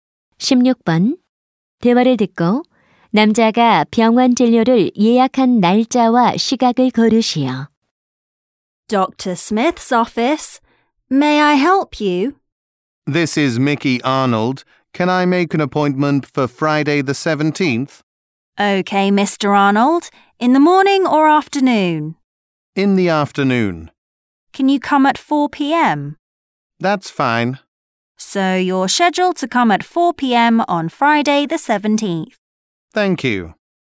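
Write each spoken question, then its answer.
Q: 대화를 듣고 남자가 병원 진료를 예약한 날짜와 시각을 고르시오.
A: 17일 금요일 오후 4시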